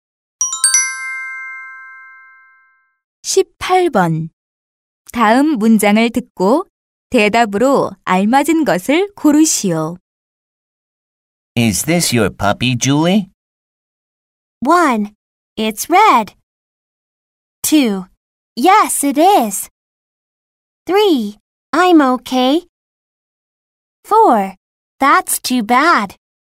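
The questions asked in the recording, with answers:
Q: 다음 문장을 듣고 대답으로 알맞은 것을 고르시오.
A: 2: Yes, it is.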